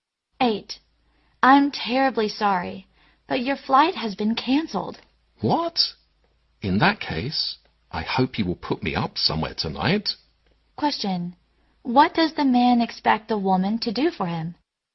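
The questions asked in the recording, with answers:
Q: What does the man expect the woman to do for him?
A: Find him a place to stay tonight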